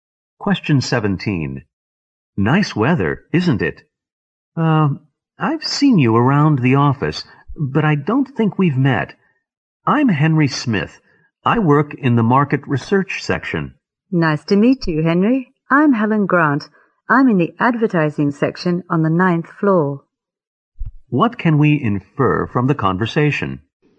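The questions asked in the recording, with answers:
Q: What can we infer from the conversation?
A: The speakers work in the same company but hadn't met before.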